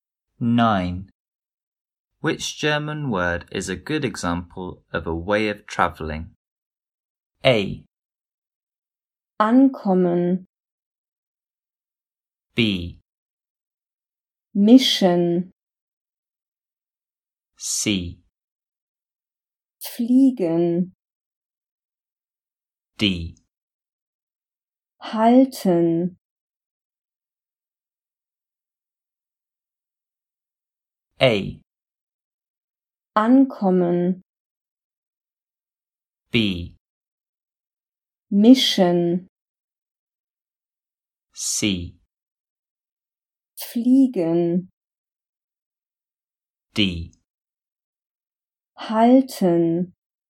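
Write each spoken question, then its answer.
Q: Which German word is a good example of a way of travelling?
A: C: Fliegen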